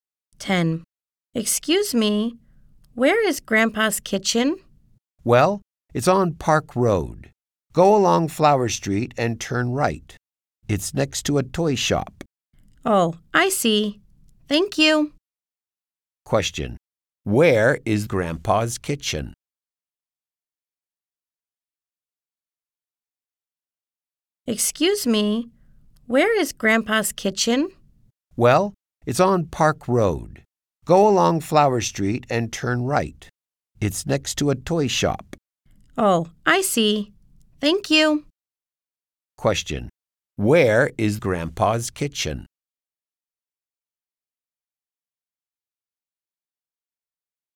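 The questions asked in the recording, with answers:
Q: Where is Grandpa's kitchen?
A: On Park Road, next to a toy shop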